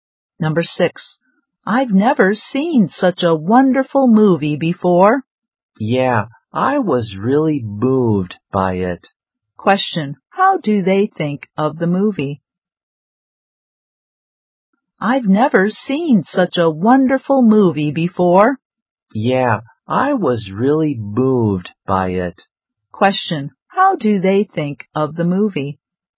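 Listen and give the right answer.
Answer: It's wonderful and moving.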